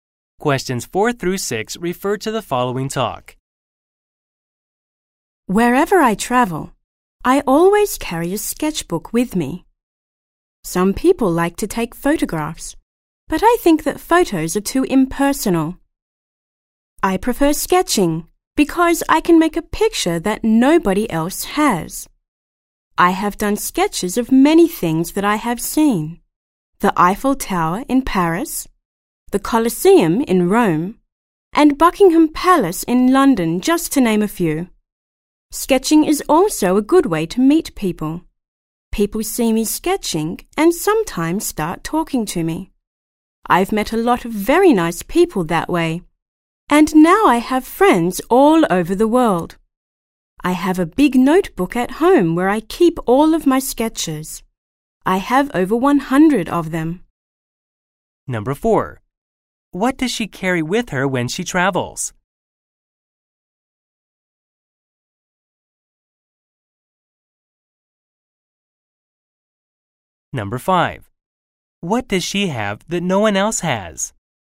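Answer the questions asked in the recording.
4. A sketchbook
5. Her own sketches (pictures nobody else has)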